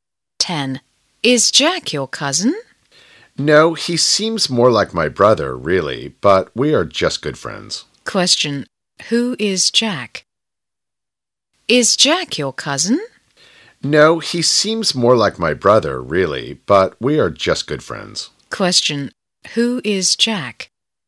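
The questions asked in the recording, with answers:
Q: Who is Jack?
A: A good friend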